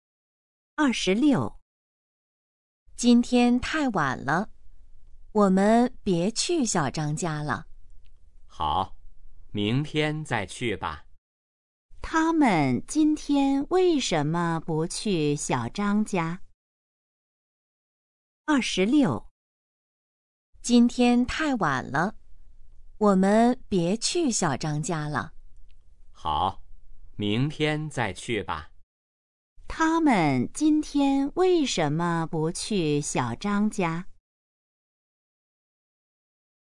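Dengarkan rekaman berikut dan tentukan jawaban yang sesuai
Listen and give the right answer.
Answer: 太晚了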